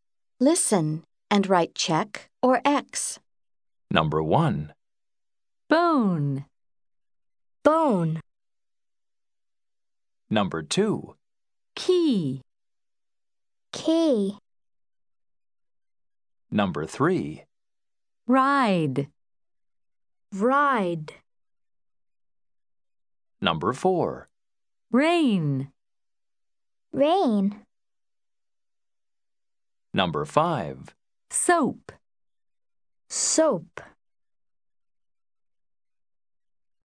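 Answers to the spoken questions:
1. Yes (check): bone
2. No (X): key
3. No (X): ride
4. No (X): rain
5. Yes (check): soap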